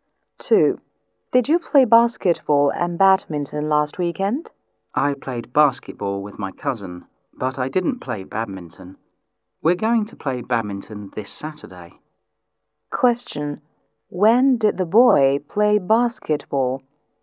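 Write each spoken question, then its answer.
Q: When did the boy play basketball?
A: Last weekend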